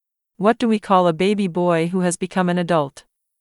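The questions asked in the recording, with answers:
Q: What do we call a baby boy who has become an adult?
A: A man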